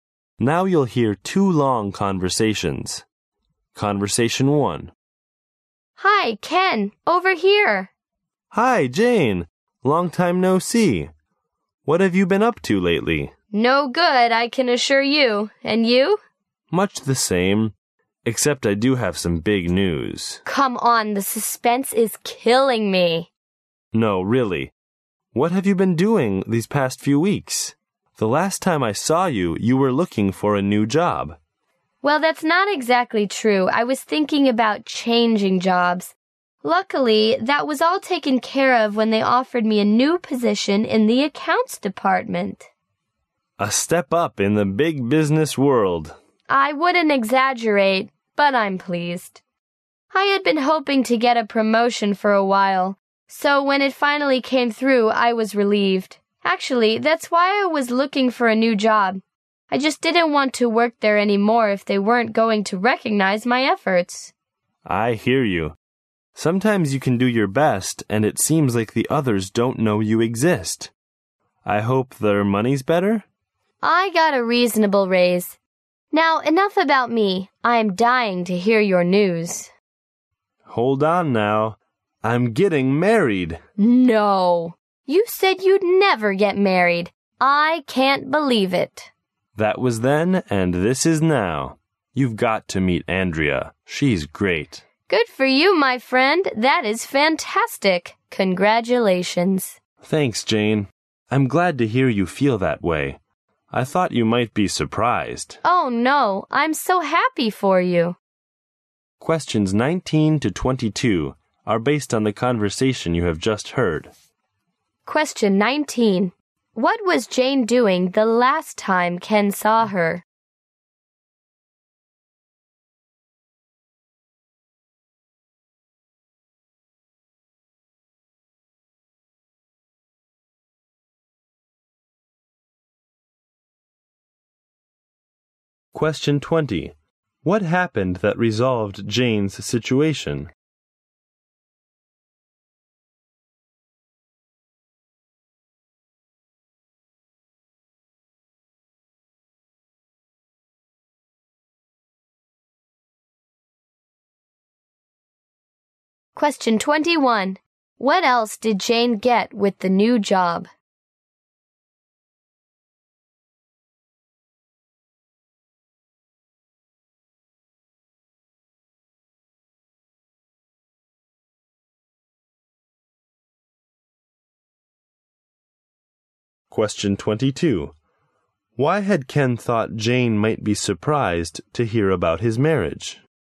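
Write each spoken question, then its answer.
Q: What was Jane doing the last time Ken saw her?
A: Looking for a new job

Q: What happened that resolved Jane's situation?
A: She was promoted to a new position in the accounts department.

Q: What else did Jane get with the new job?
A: A reasonable raise

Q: Why had Ken thought Jane might be surprised to hear about his marriage?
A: He had said he would never get married.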